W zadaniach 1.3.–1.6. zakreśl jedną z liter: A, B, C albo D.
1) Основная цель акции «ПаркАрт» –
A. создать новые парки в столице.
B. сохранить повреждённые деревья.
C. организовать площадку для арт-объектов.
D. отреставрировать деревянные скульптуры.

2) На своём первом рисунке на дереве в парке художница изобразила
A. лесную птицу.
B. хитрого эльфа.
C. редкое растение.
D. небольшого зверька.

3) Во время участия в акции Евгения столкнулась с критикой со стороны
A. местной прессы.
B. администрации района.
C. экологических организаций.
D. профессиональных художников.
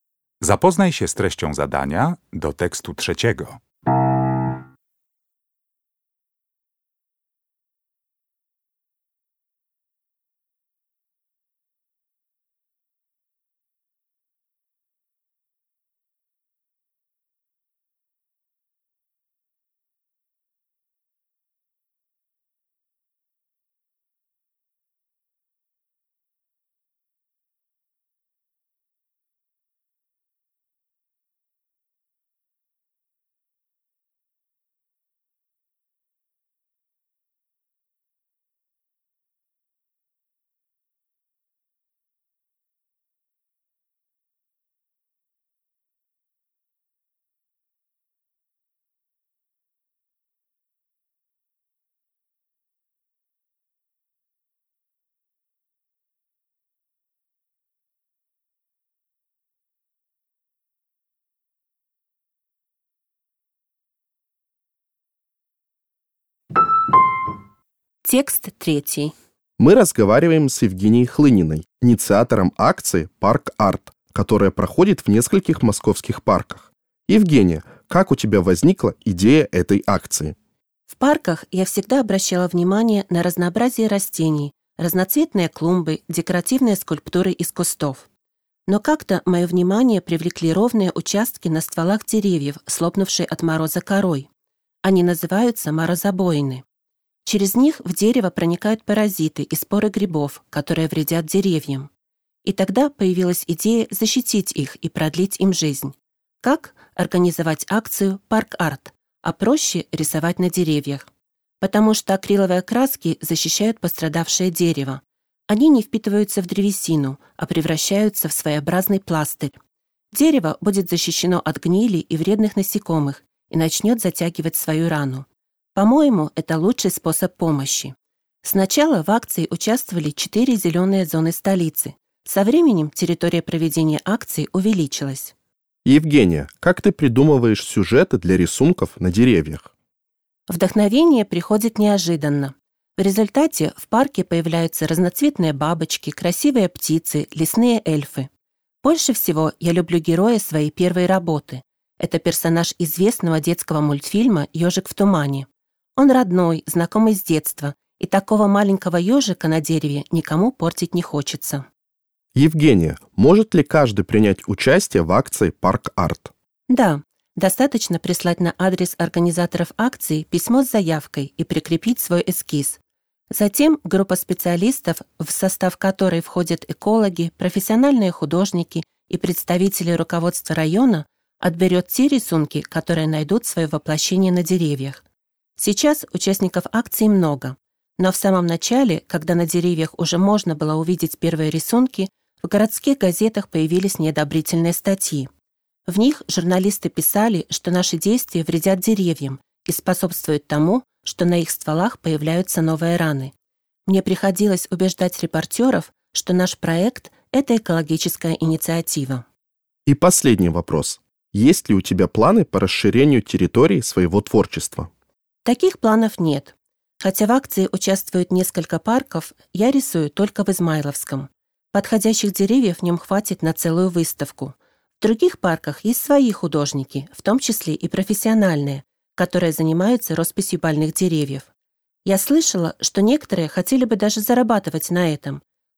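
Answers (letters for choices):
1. B
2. D
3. A

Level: Poziom: rozszerzony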